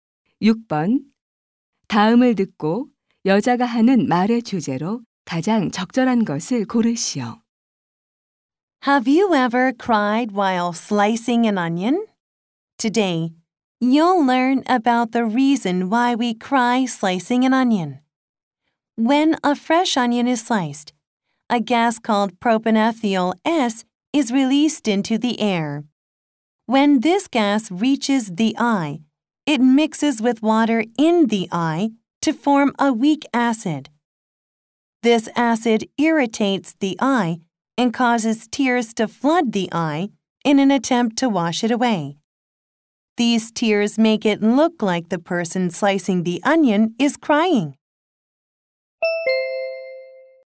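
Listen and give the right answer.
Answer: 양파를 썰 때 눈물이 나는 이유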